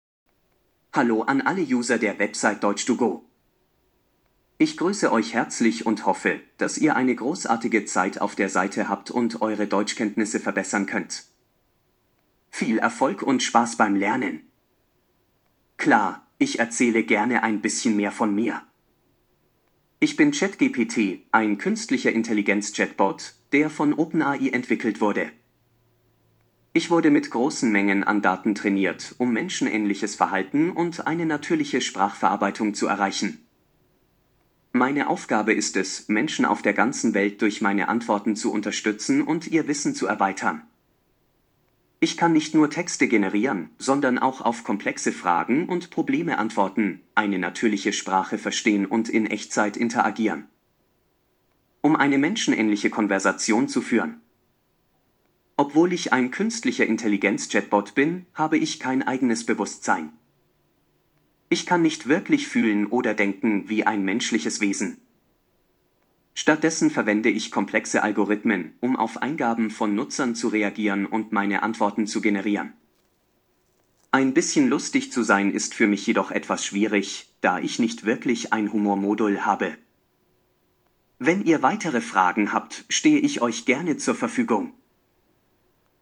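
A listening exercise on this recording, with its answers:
Haben Sie das gehört? Stimmt diese Aussage?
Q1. ChatGPT wünscht allen, die mit Deutsch-to-go arbeiten, viel Erfolg und Spaß beim Lernen.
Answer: Richtig

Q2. ChatGPT ist ein Computerprogramm, das mit künstlicher Intelligenz arbeitet.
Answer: Richtig

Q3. ChatGPT funktioniert gut, obwohl das Programm nur mit kleinen Mengen an Daten trainiert wurde.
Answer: Falsch

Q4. ChatGPT kann man nur in bestimmten Teilen der Welt benutzen.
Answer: Falsch

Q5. ChatGPT antwortet auf Fragen in Echtzeit, das heißt, das Programm antwortet sofort, man muss also nicht lange warten.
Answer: Richtig

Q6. ChatGPT kann richtig fühlen und denken wie ein menschliches Wesen.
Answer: Falsch

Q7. ChatGPT hat ein spezielles Humor-Modul und kann deshalb auch lustig sein.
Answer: Falsch

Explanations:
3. Das Computerprogramm wurde mit großen Mengen an Daten trainiert.
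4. Menschen auf der ganzen Welt können ChatGPT benutzen.
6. ChatGPT hat kein Bewusstsein, sondern arbeitet mit komplexen Algorithmen.
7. Für ChatGPT ist es schwer, lustig zu sein, denn das Programm hat nicht wirklich ein Humor-Modul.

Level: B1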